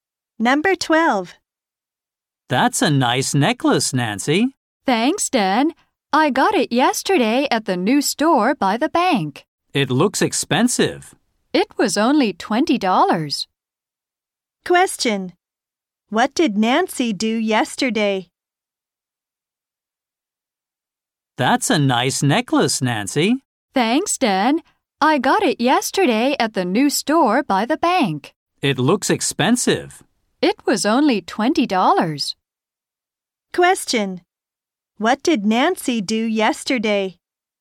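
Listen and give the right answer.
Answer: She bought a necklace at the new store by the bank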